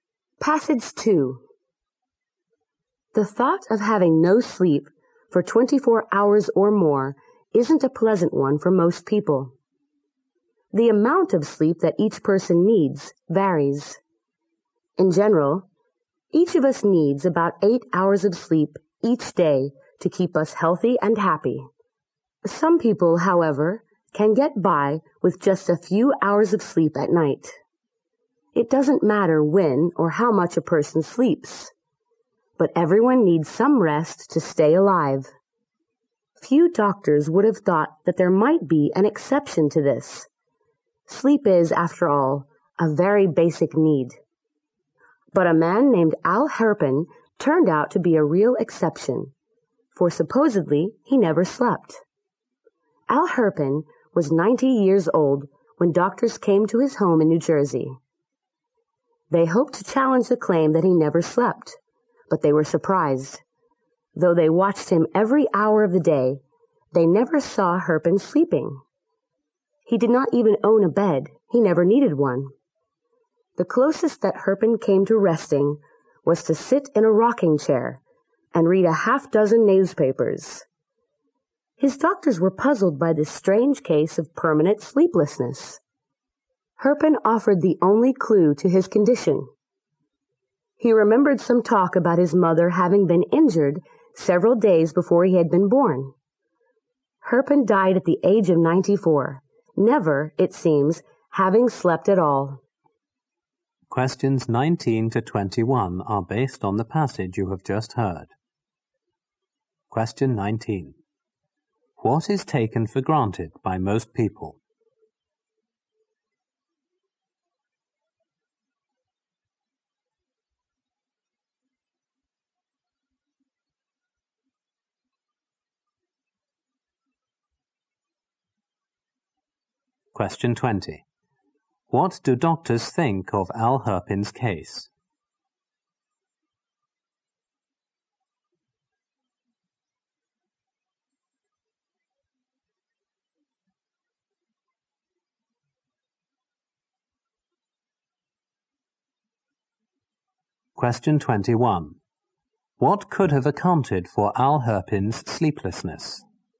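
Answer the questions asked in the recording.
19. Everyone needs some sleep.
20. It puzzled them.
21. His mother was injured a few days before he was born.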